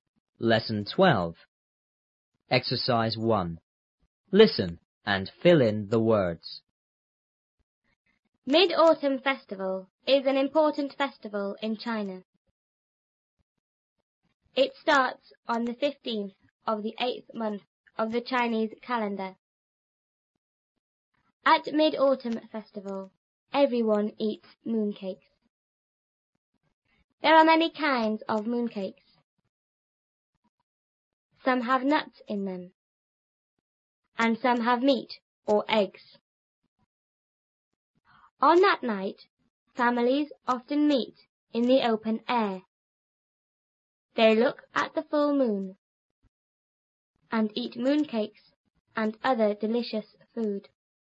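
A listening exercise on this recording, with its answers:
Listen and fill in the words.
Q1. Mid-Autumn Festival is an___festival in China.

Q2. It___on the___of the___month of the Chinese calendar.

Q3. At Mid-Autumn Festival,everyone___mooncakes.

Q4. There are many___of mooncakes.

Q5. and some have___or___.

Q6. On that night,families often___in the open air.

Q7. They look at the___moon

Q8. and eat mooncakes and other___food.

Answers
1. important
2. starts; 15th; 8th
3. eats
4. kinds
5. meat; eggs
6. meet
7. full
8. delicious

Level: 初中英语广州版3B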